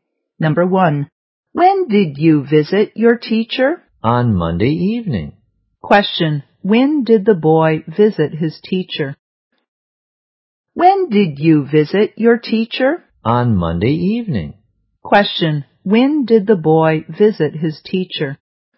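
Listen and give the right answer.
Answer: On Monday evening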